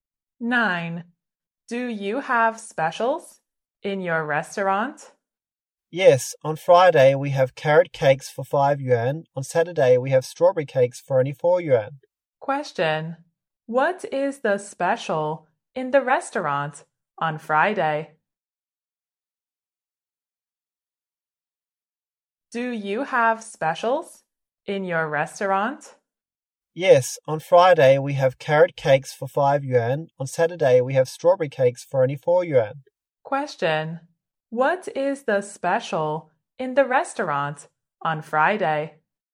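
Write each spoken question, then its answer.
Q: What is the special in the restaurant on Friday?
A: Carrot cakes for 5 yuan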